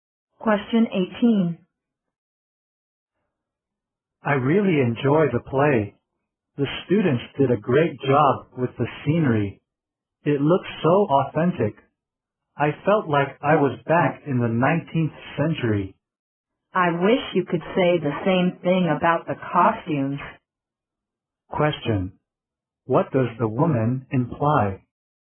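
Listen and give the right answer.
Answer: The costumes were not authentic or good.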